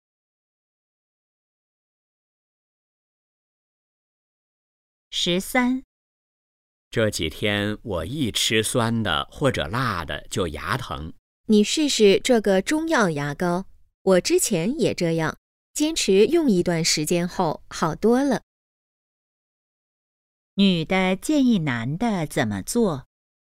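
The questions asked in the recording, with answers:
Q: 女的建议男的怎么做?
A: 用中药牙膏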